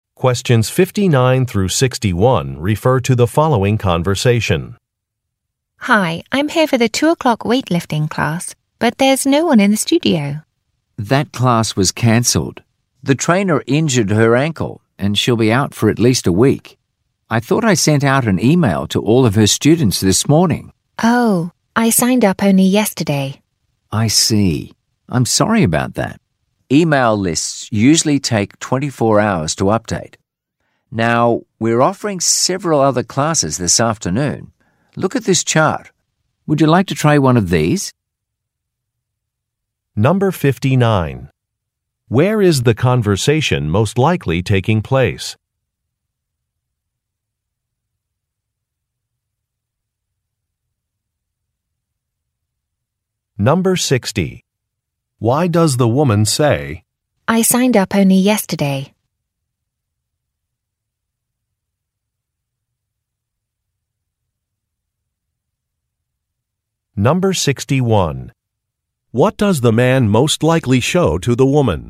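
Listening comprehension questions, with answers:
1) Where is the conversation most likely taking place?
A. At a medical clinic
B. At a fitness center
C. At a sporting goods store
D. At a pottery studio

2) Why does the woman say, "I signed up only yesterday"?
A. To explain why she was not notified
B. To confirm that she made a payment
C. To request some needed materials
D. To justify some class absences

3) What does the man most likely show to the woman?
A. A price list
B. A floor plan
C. An invoice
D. A schedule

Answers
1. B
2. A
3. D

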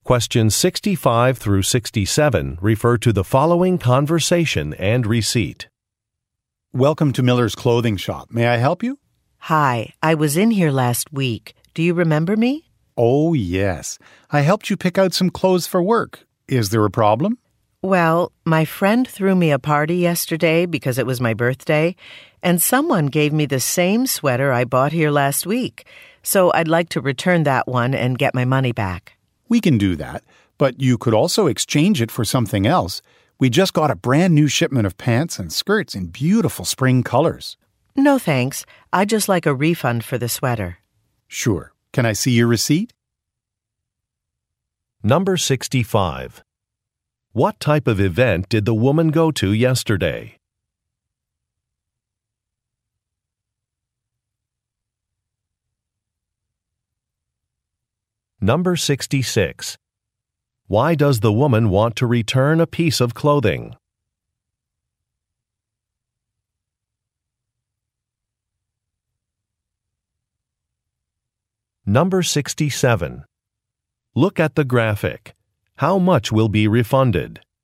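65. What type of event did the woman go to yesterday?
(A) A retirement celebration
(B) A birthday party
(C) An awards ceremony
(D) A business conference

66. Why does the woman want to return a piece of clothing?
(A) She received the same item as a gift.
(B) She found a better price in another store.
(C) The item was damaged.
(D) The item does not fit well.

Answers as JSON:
{"65": "B", "66": "A"}

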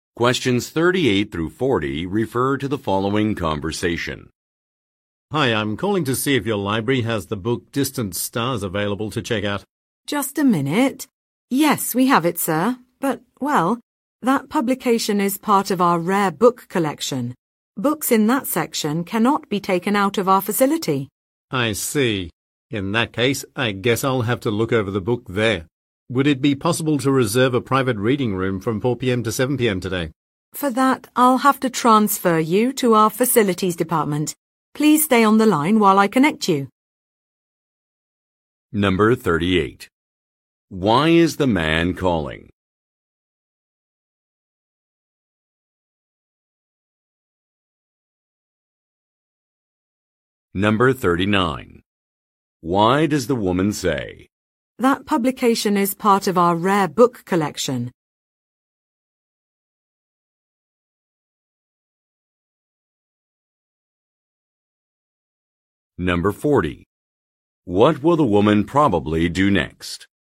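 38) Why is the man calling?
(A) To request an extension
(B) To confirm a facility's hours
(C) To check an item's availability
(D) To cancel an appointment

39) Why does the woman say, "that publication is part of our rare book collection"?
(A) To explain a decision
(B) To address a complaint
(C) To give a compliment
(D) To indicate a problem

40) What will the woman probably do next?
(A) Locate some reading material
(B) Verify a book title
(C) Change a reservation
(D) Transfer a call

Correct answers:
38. C
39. D
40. D

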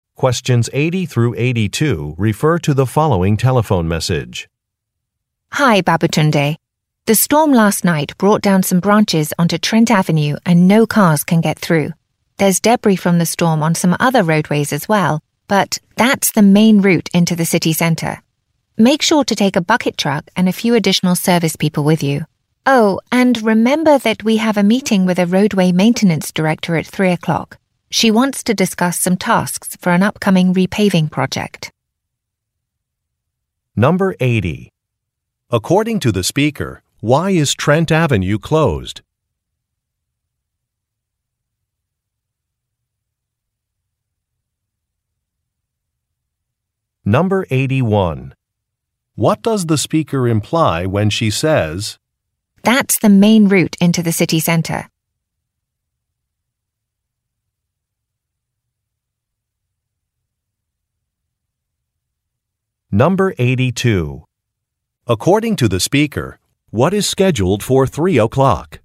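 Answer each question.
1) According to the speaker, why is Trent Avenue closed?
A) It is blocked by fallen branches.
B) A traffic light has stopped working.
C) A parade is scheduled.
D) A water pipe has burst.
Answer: A

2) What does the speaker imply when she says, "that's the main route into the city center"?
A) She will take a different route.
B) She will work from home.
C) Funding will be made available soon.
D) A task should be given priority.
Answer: D

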